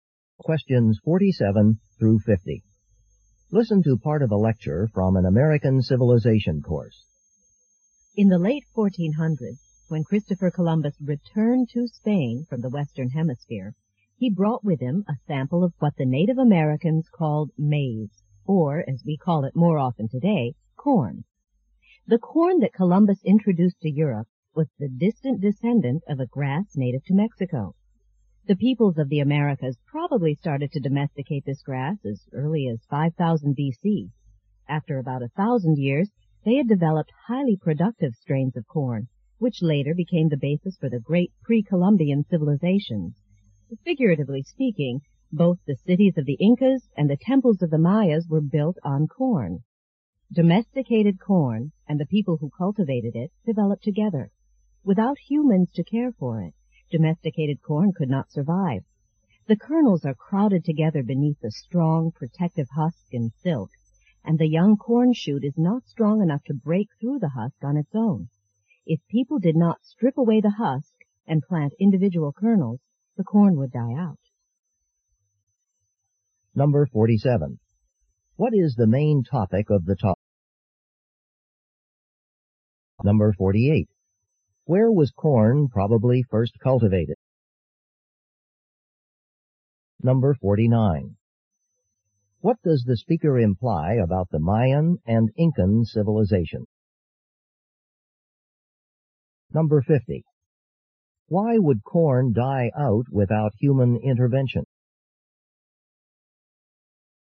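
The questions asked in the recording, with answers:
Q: What is the main topic of the talk?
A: The history of corn

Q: Where was corn probably first cultivated?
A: Mexico

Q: What does the speaker imply about the Mayan and Incan civilization?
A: They depended on corn

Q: Why would corn die out without human intervention?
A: The young shoot cannot break through the husk by itself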